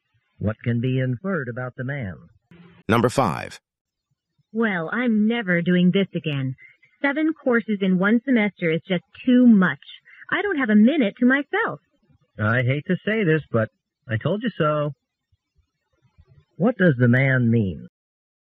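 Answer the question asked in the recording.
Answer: He had warned her that seven courses would be too much.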